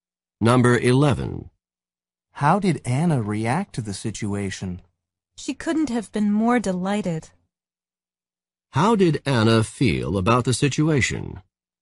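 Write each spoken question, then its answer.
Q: How did Anna feel about the situation?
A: Extremely delighted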